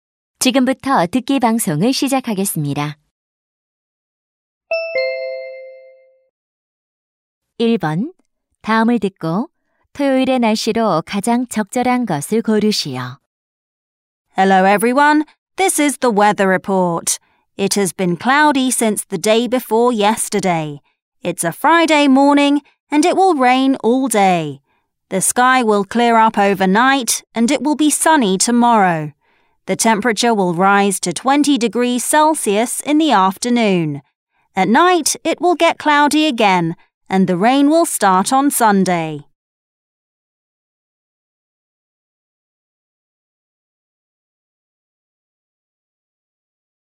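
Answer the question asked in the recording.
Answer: 맑음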